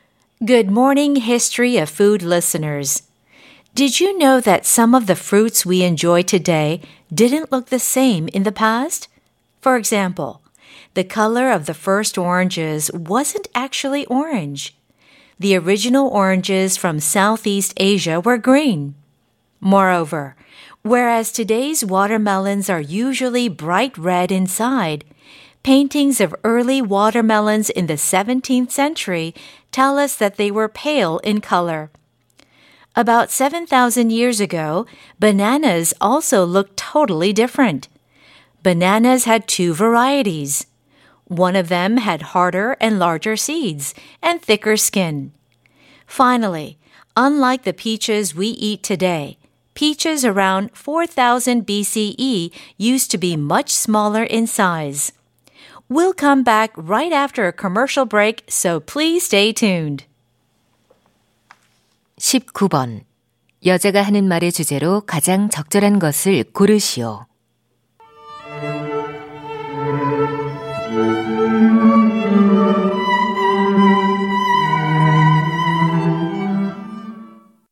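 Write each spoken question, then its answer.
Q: 여자가 하는 말의 주제로 가장 적절한 것을 고르시오.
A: 과거에는 지금과 모습이 달랐던 과일들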